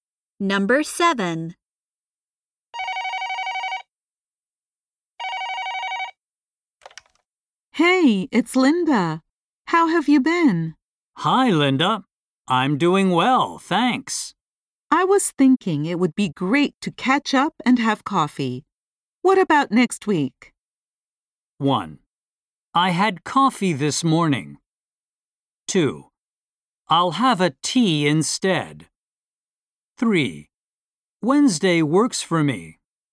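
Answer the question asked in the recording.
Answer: 3: Wednesday works for me.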